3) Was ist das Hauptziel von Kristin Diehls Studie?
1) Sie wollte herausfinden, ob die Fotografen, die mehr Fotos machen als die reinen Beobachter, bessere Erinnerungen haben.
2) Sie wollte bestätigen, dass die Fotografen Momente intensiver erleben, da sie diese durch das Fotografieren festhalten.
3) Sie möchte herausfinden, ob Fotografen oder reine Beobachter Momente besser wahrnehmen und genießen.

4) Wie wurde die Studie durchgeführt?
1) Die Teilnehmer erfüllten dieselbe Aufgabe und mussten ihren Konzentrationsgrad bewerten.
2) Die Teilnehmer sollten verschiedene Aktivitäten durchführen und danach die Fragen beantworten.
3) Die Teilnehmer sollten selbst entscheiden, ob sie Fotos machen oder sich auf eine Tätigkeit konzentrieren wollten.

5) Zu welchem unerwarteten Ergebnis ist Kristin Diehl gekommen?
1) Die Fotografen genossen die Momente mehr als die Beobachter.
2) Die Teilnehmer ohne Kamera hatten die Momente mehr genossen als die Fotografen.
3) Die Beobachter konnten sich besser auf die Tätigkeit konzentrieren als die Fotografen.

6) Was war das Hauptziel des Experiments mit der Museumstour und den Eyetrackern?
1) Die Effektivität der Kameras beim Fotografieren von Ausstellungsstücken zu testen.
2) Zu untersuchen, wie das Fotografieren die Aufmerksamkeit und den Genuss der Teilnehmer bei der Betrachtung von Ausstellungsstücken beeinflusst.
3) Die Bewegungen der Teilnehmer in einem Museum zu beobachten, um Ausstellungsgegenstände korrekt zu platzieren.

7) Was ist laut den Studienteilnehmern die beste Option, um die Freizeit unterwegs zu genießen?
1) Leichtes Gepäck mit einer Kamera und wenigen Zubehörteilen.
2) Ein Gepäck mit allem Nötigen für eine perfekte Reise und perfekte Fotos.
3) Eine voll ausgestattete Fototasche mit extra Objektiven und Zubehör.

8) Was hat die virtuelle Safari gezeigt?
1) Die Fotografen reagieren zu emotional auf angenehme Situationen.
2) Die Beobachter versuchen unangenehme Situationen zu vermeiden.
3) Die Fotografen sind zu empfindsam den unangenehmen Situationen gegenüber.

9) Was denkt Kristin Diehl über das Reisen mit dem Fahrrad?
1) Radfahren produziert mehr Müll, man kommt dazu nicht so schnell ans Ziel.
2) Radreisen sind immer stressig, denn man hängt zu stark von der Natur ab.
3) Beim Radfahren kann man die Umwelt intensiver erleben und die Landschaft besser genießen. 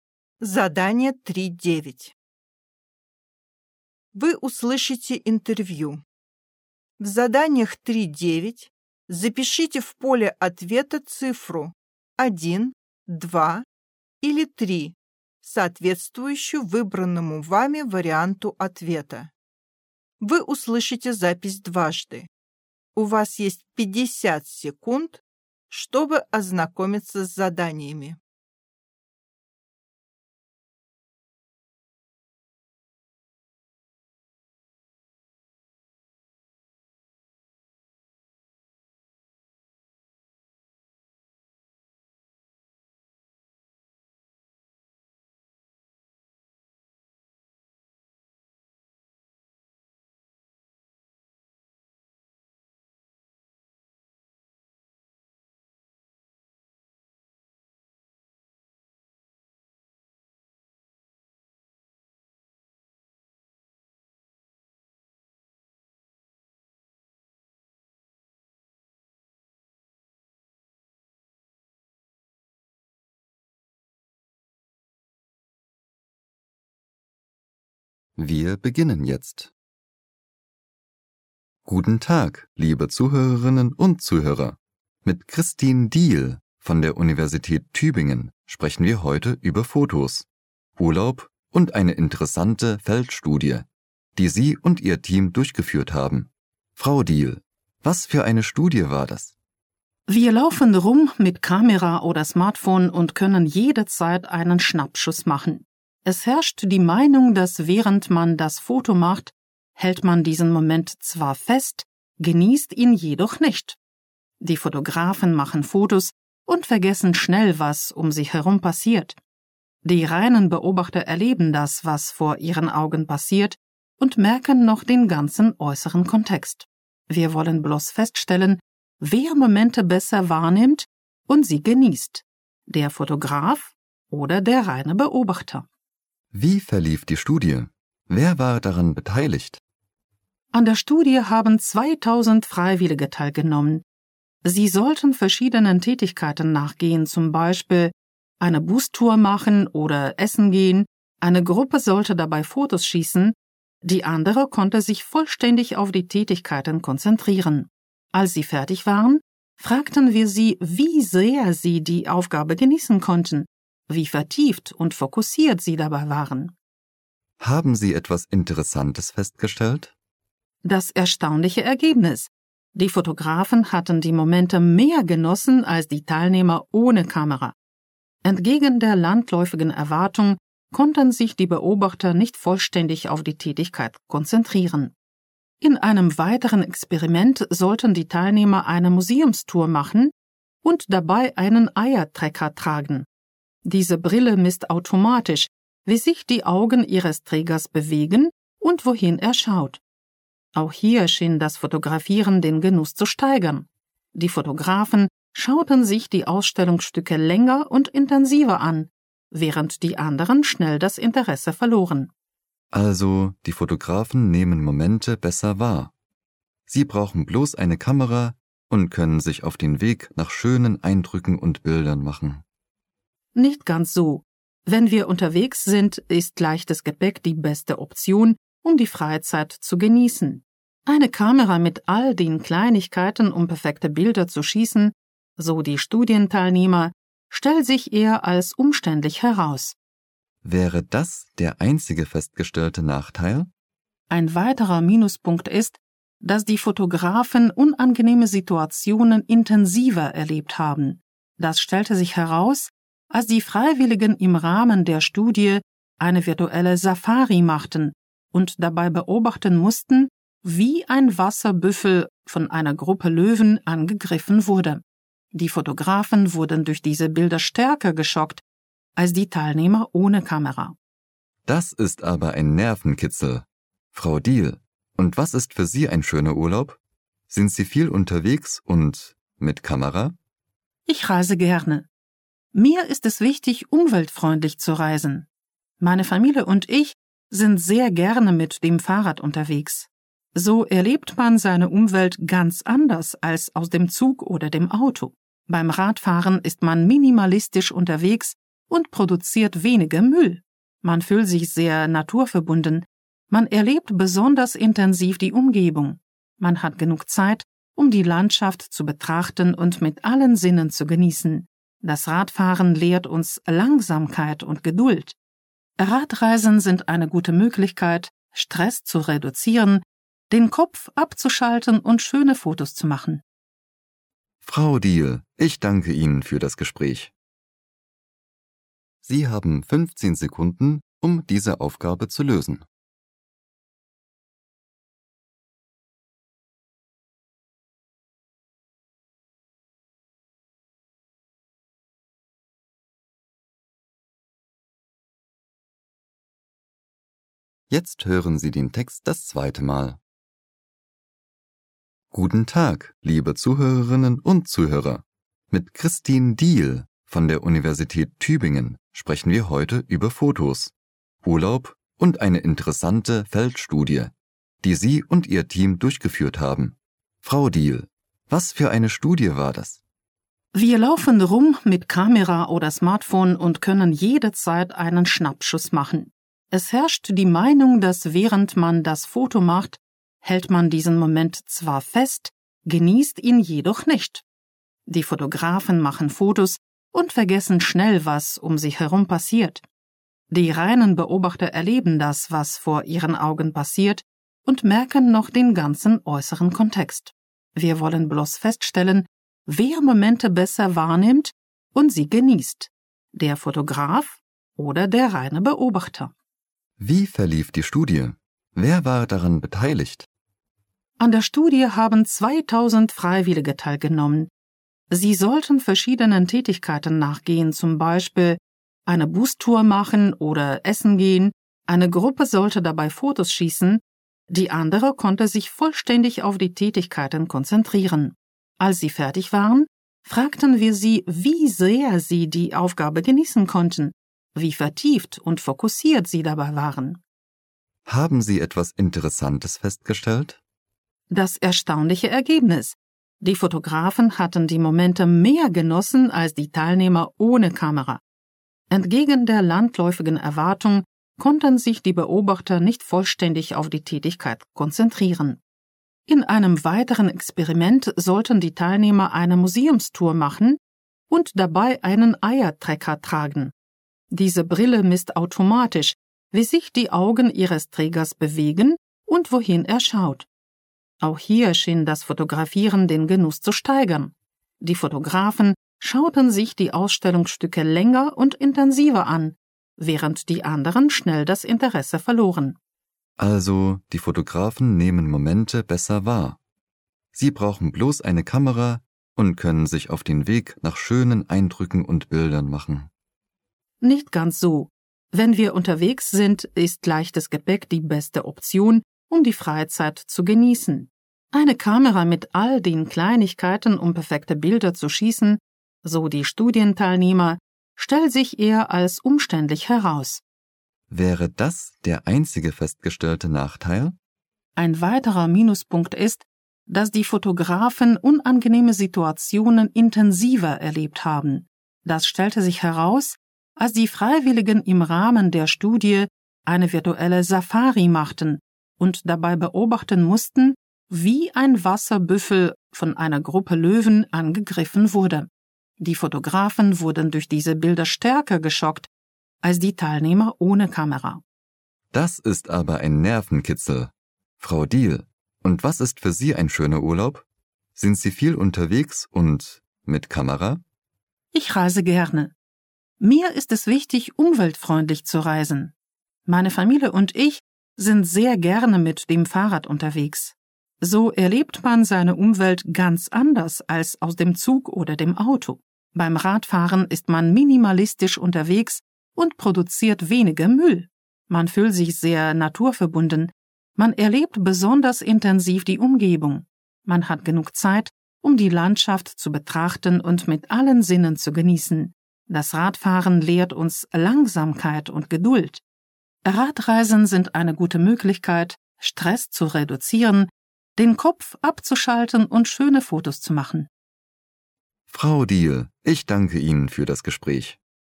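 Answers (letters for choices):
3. 3
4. 2
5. 1
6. 2
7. 1
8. 3
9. 3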